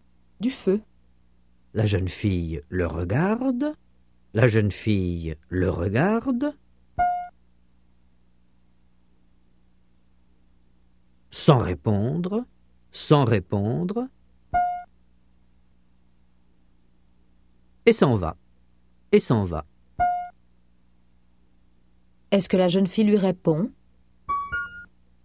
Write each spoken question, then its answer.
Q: Est-ce que la jeune fille lui répond ?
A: Non, elle le regarde sans répondre.